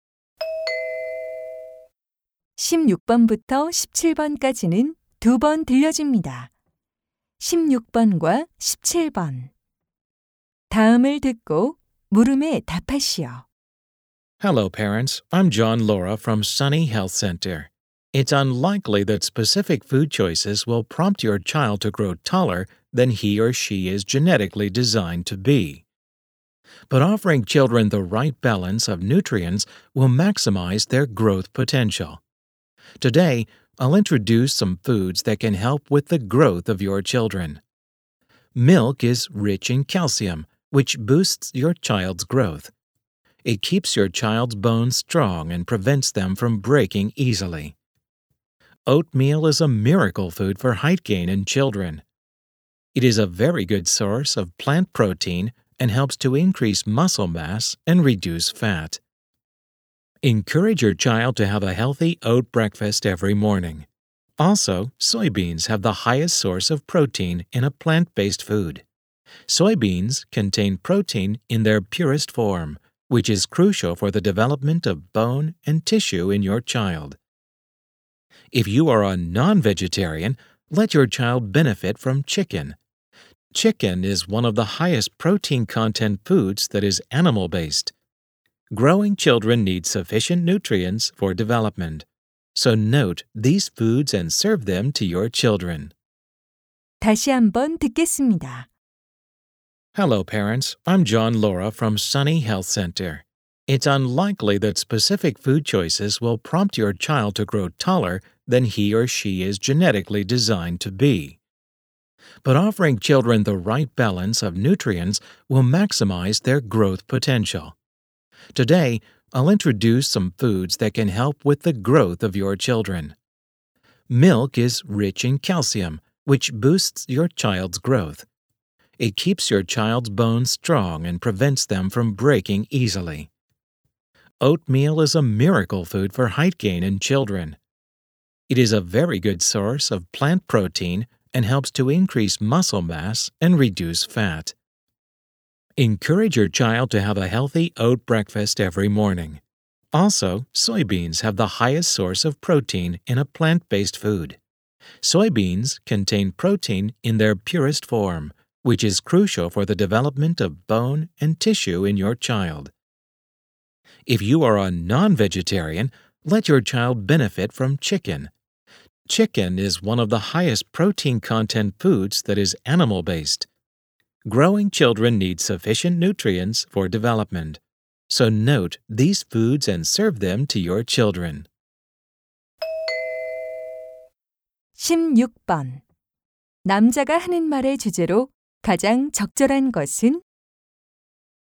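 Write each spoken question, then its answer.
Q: 남자가 하는 말의 주제로 가장 적절한 것은?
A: 아이들의 성장에 도움이 되는 음식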